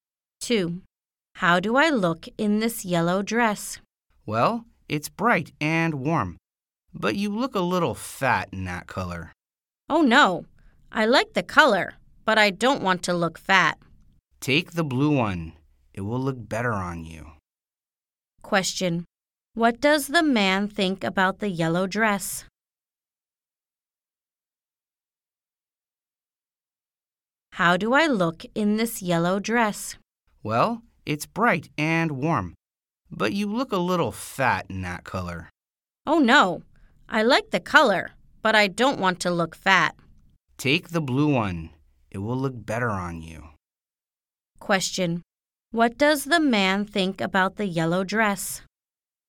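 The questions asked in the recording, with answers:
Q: Question. What does the man think about the yellow dress?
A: It's bright and warm, but she looks a little fat in it.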